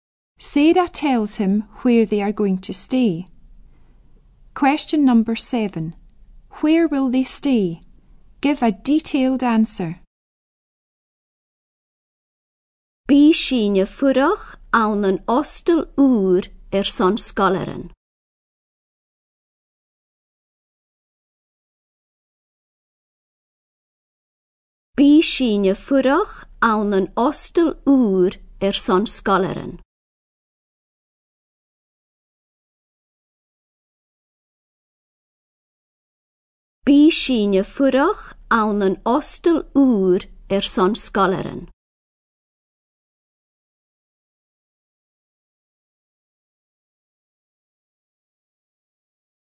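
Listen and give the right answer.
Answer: In a new hostel for pupils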